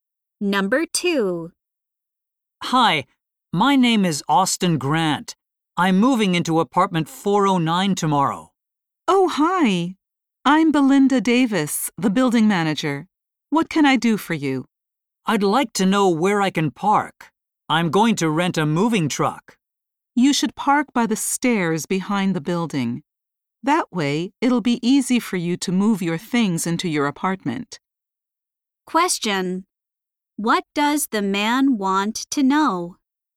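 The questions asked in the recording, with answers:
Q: What does the man want to know?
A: Where he can park his moving truck.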